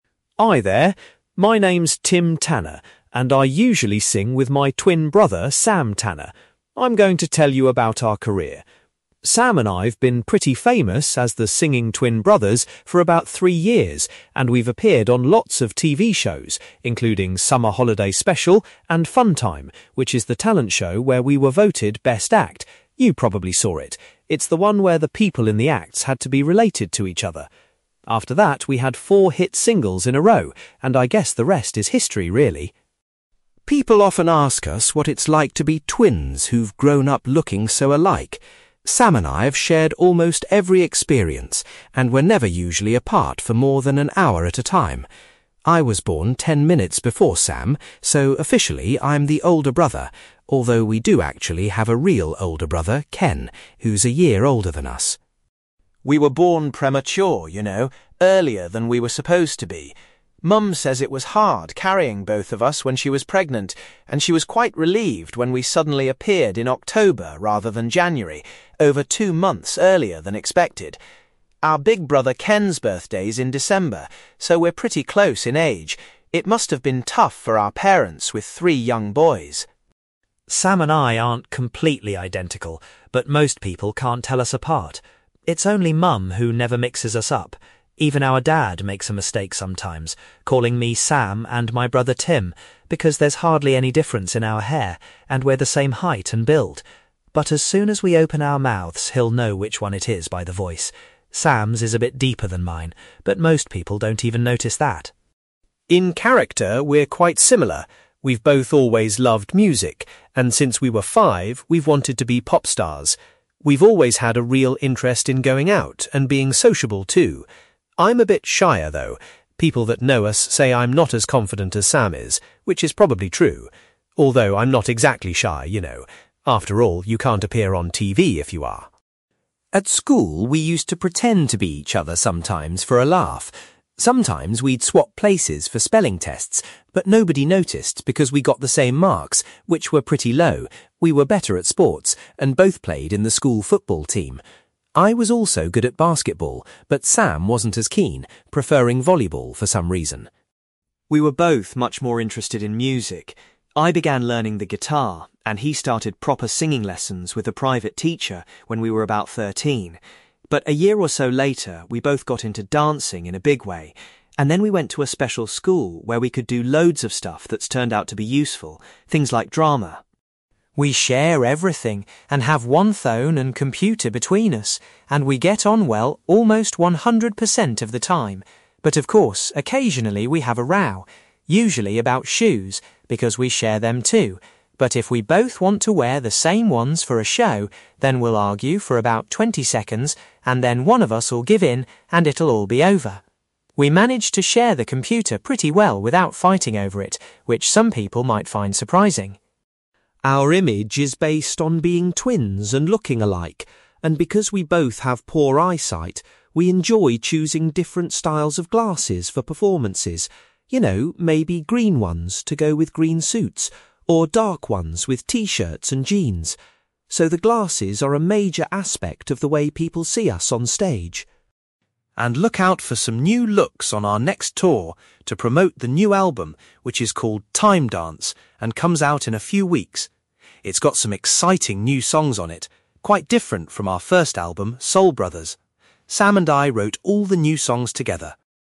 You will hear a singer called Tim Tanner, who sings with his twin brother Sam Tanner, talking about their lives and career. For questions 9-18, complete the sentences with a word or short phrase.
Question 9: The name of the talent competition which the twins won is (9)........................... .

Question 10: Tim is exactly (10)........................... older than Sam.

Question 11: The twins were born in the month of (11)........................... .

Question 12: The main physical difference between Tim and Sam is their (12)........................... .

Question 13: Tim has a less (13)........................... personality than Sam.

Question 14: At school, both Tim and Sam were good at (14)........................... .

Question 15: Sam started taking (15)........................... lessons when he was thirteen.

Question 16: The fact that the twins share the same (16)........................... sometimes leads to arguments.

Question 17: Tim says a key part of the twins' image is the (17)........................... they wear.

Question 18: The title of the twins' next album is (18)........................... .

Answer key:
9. Funtime
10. 10 minutes
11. October
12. voice
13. confident
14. football
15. singing
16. shoes
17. glasses
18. Time Dance

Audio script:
Tim Tanner: Hi there. My name's Tim Tanner, and I usually sing with my twin brother, Sam Tanner. I'm going to tell you about our career. Sam and I've been pretty famous as the singing twin brothers for about three years and we've appeared on lots of TV shows including Summer Holiday Special and Funtime, which is the talent show where we were voted best act – you probably saw it. It's the one where the people in the acts had to be related to each other. After that we had four hit singles in a row and I guess the rest is history really.
People often ask us what it's like to be twins who've grown up looking so alike. Sam and I've shared almost every experience, and we're never usually apart for more than an hour at a time. I was born ten minutes before Sam so officially I'm the older brother, although we do actually have a real older brother, Ken, who's a year older than us.
We were born premature, you know – earlier than we were supposed to be. Mum says it was hard carrying both of us when she was pregnant, and she was quite relieved when we suddenly appeared in October rather than January, over two months earlier than expected. Our big brother Ken's birthday's in December – so we're pretty close in age – it must have been tough for our parents with three young boys.
Sam and I aren't completely identical, but most people can't tell us apart. It's only mum who never mixes us up. Even our dad makes a mistake sometimes calling me 'Sam' and my brother 'Tim', because there's hardly any difference in our hair, and we're the same height and build. But as soon as we open our mouths, he'll know which one it is by the voice. Sam's is a bit deeper than mine, but most people don't even notice that.
In character we're quite similar – we've both always loved music, and since we were five we've wanted to be pop stars. We've always had a real interest in going out, and being sociable too. I'm a bit shyer though – people that know us say I'm not as confident as Sam is, which is probably true. Although I'm not exactly shy, you know. After all, you can't appear on TV if you are!
At school we used to pretend to be each other sometimes for a laugh. Sometimes we'd swap places for spelling tests but nobody noticed because we got the same marks, which were pretty low – we were better at sports, and both played in the school football team. I was also good at basketball, but Sam wasn't as keen, preferring volleyball for some reason.
We were both much more interested in music. I began learning the guitar and he started proper singing lessons with a private teacher when we were about thirteen, but a year or so later we both got into dancing in a big way and then we went to a special school where we could do loads of stuff that's turned out to be useful – things like drama.
We share everything, and have one phone and computer between us and we get on well almost 100 percent of the time, but of course occasionally we have a row, usually about shoes because we share them too, but if we both want to wear the same ones for a show then we'll argue for about 20 seconds and then one of us'll give in and it'll all be over. We manage to share the computer pretty well without fighting over it, which some people might find surprising.
Our image is based on being twins and looking alike and because we both have poor eyesight we enjoy choosing different styles of glasses for performances, you know, maybe green ones, to go with green suits, or dark ones with T-shirts and jeans. So the glasses are a major aspect of the way people see us on stage.
And look out for some new looks on our next tour, to promote the new album which is called Time Dance and comes out in a few weeks. It's got some exciting new songs on it, quite different from our first album Soul Brothers. Sam and I wrote all the new songs together.

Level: B2 English Listening Exercise